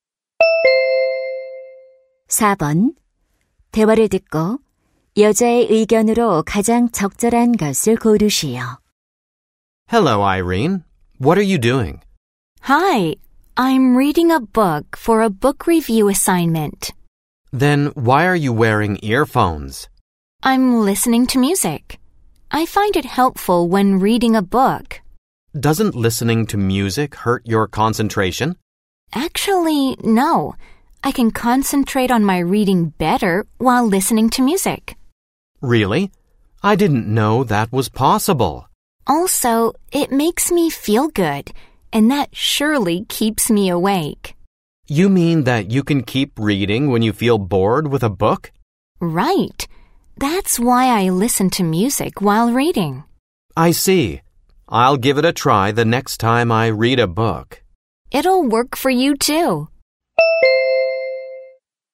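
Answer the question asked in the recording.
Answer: 독서할 때 음악을 들으면 도움이 된다.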